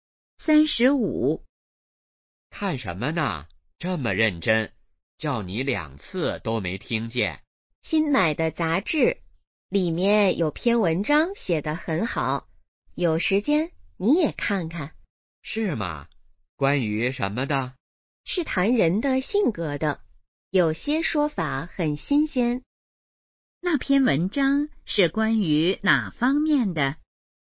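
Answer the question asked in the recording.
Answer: 人的性格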